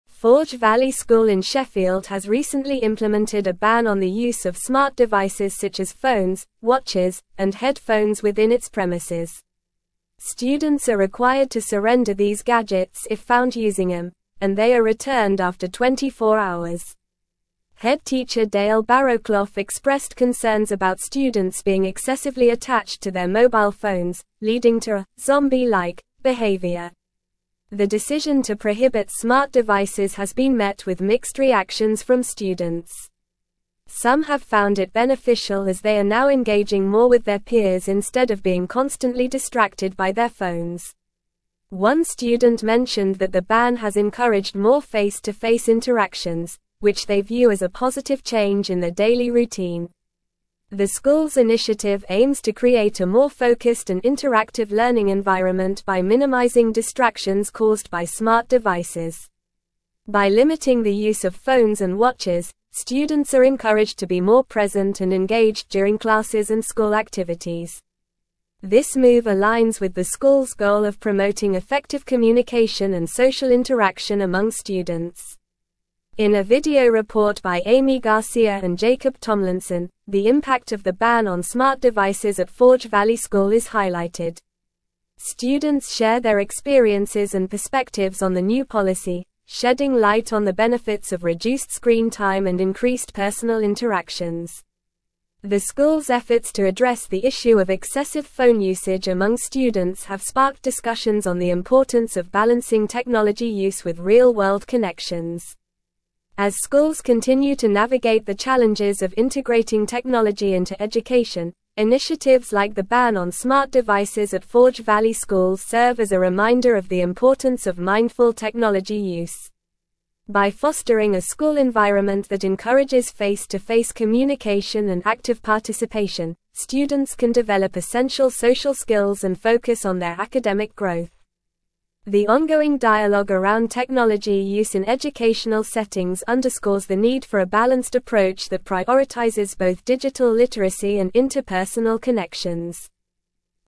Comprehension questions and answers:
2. Forge Valley School in Sheffield has recently implemented a ban on the use of smart devices such as (1)______, (2)______, and headphones within its premises.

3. Students are (3)______ to surrender these gadgets if found using them, and they are returned after 24 hours.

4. The decision to prohibit smart devices has been met with mixed (4)______ from students.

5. which they view as a positive change in their daily (5)______.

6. The school's initiative aims to create a more (6)______ and interactive learning environment by minimizing distractions caused by smart devices.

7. students are encouraged to be more (7)______ and (8)______ during classes and school activities.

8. students are encouraged to be more (7)______ and (8)______ during classes and school activities.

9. shedding light on the (9)______ of reduced screen time and increased personal interactions.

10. The school's efforts to address the issue of excessive phone usage among students have sparked (10)______ on the importance of balancing technology use with real-world (11)______.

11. The school's efforts to address the issue of excessive phone usage among students have sparked (10)______ on the importance of balancing technology use with real-world (11)______.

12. As (12)______ continue to navigate the challenges of (13)______ technology into education,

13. As (12)______ continue to navigate the challenges of (13)______ technology into education,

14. By fostering a school (14)______ that encourages face-to-face communication and active participation,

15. students can develop essential social skills and focus on their academic (15)______.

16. The ongoing dialogue around technology use in educational settings underscores the need for a (16)______ approach that prioritizes both digital literacy and interpersonal connections.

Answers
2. watches
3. required
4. reactions
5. routine
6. focused
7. present
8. engaged
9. benefits
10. discussions
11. connections
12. schools
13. integrating
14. environment
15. growth
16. balanced

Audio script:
Forge Valley School in Sheffield has recently implemented a ban on the use of smart devices such as phones, watches, and headphones within its premises. Students are required to surrender these gadgets if found using them, and they are returned after 24 hours. Head teacher Dale Barrowclough expressed concerns about students being excessively attached to their mobile phones, leading to a "zombie-like" behavior.
The decision to prohibit smart devices has been met with mixed reactions from students. Some have found it beneficial as they are now engaging more with their peers instead of being constantly distracted by their phones. One student mentioned that the ban has encouraged more face-to-face interactions, which they view as a positive change in their daily routine.
The school's initiative aims to create a more focused and interactive learning environment by minimizing distractions caused by smart devices. By limiting the use of phones and watches, students are encouraged to be more present and engaged during classes and school activities. This move aligns with the school's goal of promoting effective communication and social interaction among students.
In a video report by Amy Garcia and Jacob Tomlinson, the impact of the ban on smart devices at Forge Valley School is highlighted. Students share their experiences and perspectives on the new policy, shedding light on the benefits of reduced screen time and increased personal interactions. The school's efforts to address the issue of excessive phone usage among students have sparked discussions on the importance of balancing technology use with real-world connections.
As schools continue to navigate the challenges of integrating technology into education, initiatives like the ban on smart devices at Forge Valley School serve as a reminder of the importance of mindful technology use. By fostering a school environment that encourages face-to-face communication and active participation, students can develop essential social skills and focus on their academic growth. The ongoing dialogue around technology use in educational settings underscores the need for a balanced approach that prioritizes both digital literacy and interpersonal connections.

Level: Level 4